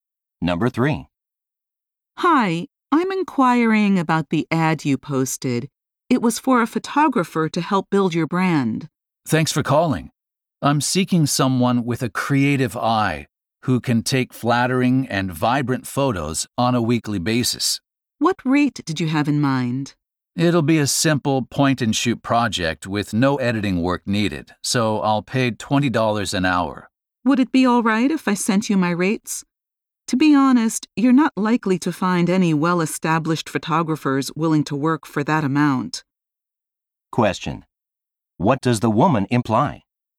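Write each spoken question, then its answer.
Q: What does the woman imply?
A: The man's rate of $20 an hour is too low for well-established photographers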